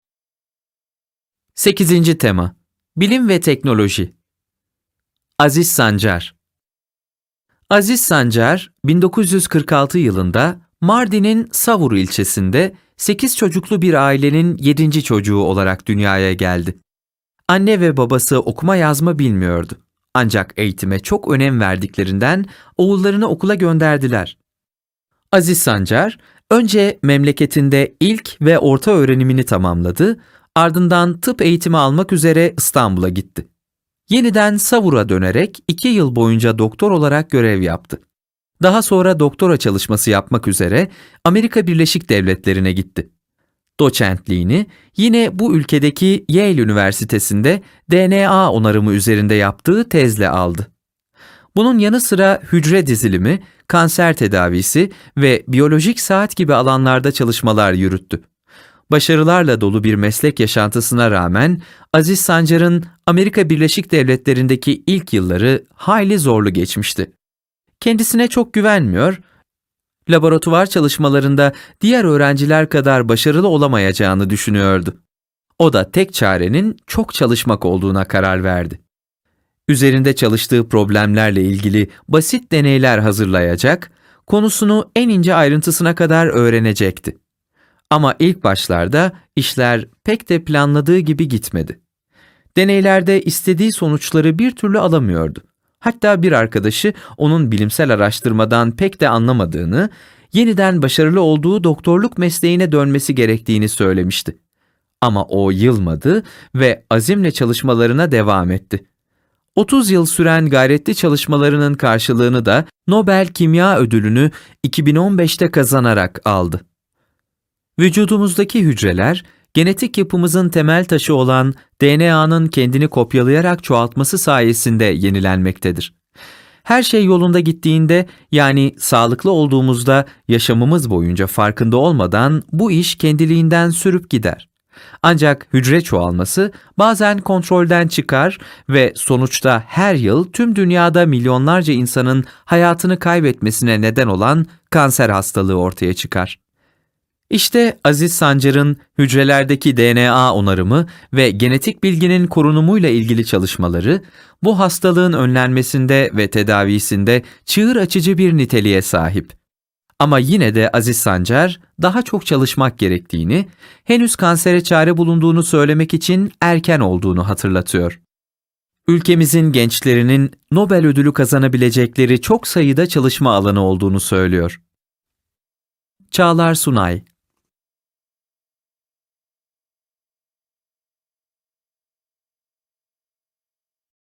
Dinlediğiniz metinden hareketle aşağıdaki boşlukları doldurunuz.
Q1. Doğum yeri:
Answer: Mardin'in Savur ilçesi

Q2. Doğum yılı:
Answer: 1946

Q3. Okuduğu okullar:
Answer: İlk ve orta öğrenimini Mardin'de bitirdi. Tıp eğitimini İstanbul'da aldı. Doçentliğini Yale Üniversitesi'nde aldı.

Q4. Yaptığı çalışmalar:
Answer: DNA onarımı, hücre dizilimi, kanser tedavisi, biyolojik saat

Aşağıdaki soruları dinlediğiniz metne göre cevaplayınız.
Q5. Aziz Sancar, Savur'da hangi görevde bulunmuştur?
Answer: İki yıl boyunca doktor olarak görev yapmıştır.

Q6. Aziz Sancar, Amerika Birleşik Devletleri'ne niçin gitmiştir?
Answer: Doktora çalışması yapmak için gitmiştir.

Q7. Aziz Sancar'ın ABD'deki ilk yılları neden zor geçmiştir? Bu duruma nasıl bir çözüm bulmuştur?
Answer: Kendisine çok güvenmediği ve laboratuvar çalışmalarında diğer öğrenciler kadar başarılı olamayacağını düşünüyordu. Çözümü çok çalışmakta bulmuştur.

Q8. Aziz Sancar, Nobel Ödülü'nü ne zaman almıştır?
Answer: 2015'te almıştır.

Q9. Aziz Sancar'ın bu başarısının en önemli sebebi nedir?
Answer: En önemli sebebi çok çalışmasıdır.

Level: 5. Sınıf